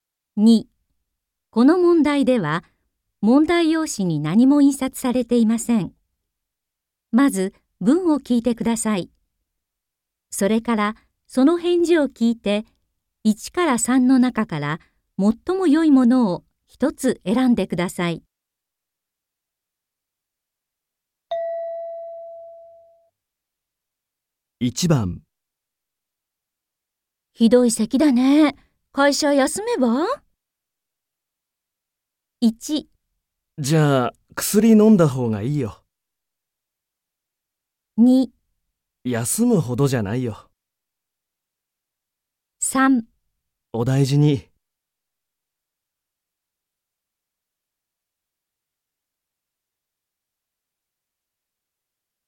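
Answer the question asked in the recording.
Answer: 休むほどじゃないよ。

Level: N3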